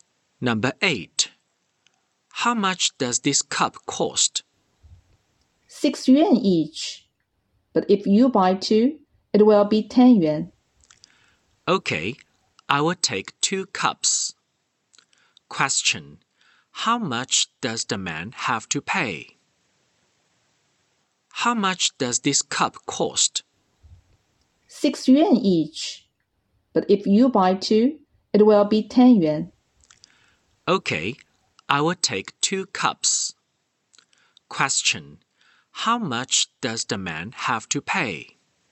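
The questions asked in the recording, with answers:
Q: Question, how much does the man have to pay?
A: 10 yuan.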